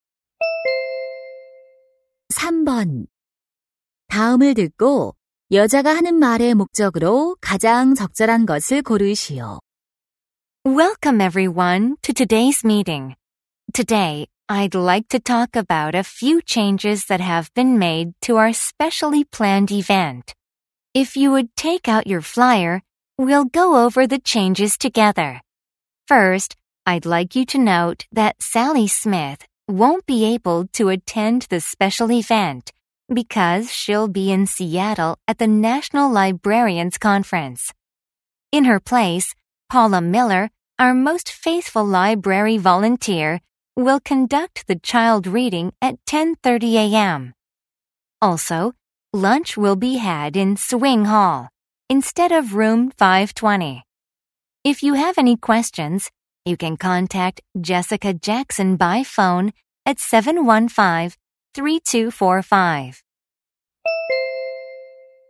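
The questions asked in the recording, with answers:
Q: 다음을 듣고 여자가 하는 말의 목적으로 가장 적절한 것을 고르시오.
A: 특별 행사의 변경 사항을 알리려고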